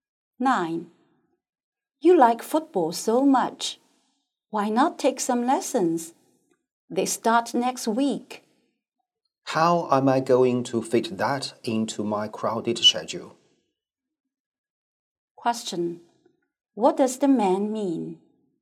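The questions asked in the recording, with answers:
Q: What does the man mean?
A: He has no time for football lessons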